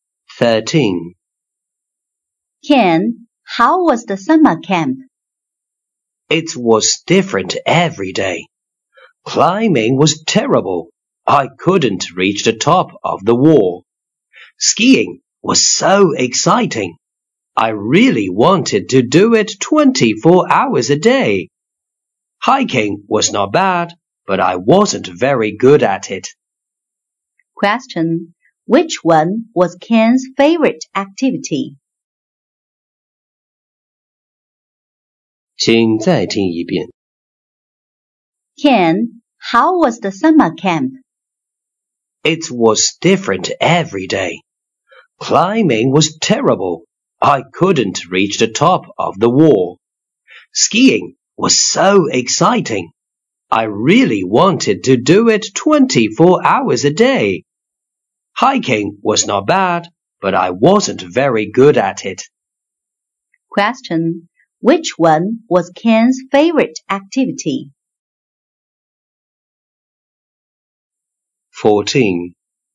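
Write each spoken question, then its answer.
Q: Which one was Ken's favorite activity?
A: Skiing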